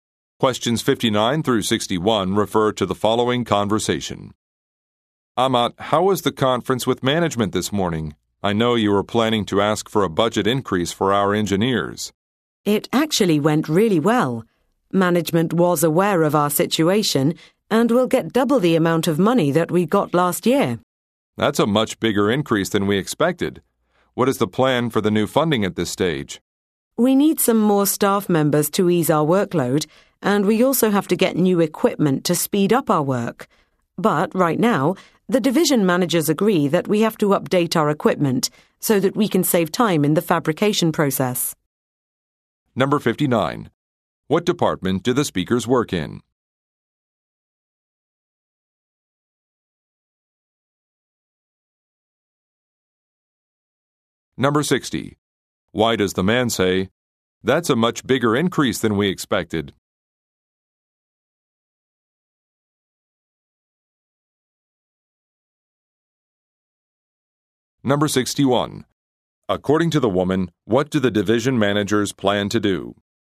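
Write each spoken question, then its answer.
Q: Why does the man say, "That's a much bigger increase than we expected"?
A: To express surprise at the size of the budget increase

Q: According to the woman, what do the division managers plan to do?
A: Update the equipment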